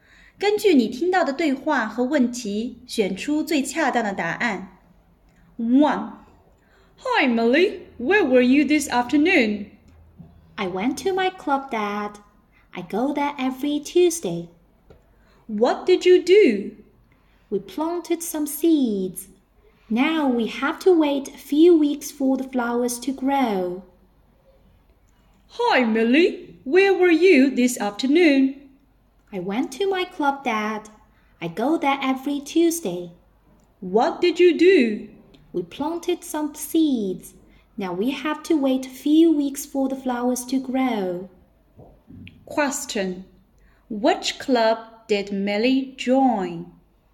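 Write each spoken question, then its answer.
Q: Question. Which club did Millie join?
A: The gardening club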